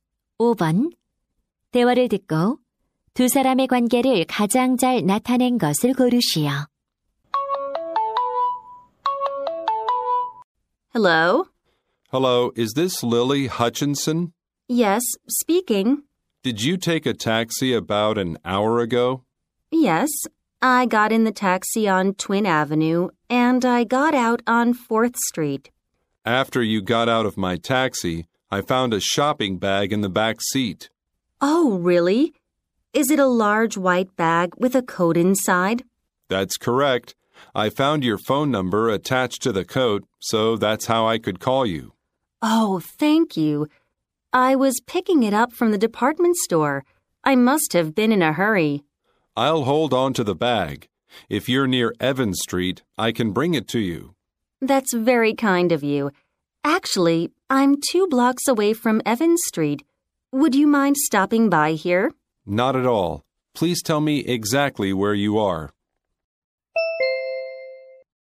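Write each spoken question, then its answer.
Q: 대화를 듣고 두 사람의 관계를 가장 잘 나타낸 것을 고르시오.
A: 택시 기사 - 승객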